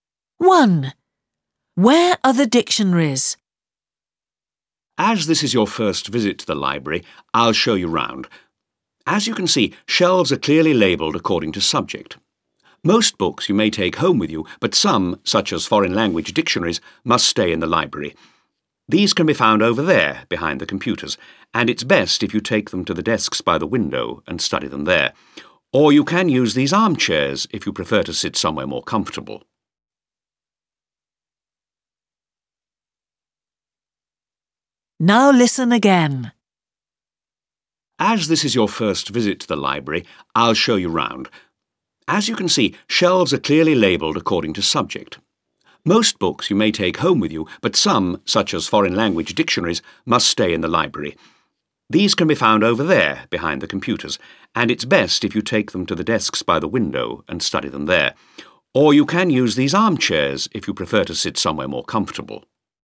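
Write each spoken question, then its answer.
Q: Where are the dictionaries?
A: Behind the computers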